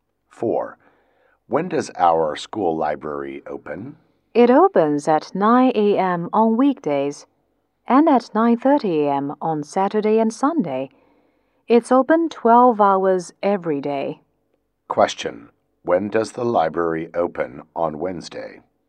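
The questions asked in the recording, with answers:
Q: When does the library open on Wednesday?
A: At 9 a.m.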